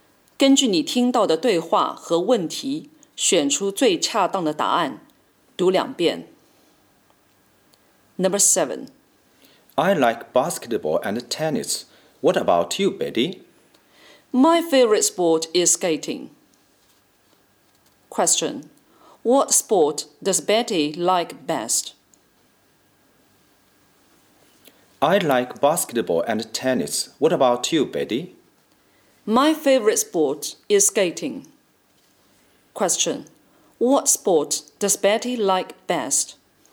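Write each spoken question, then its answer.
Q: What sport does Betty like best?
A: Skating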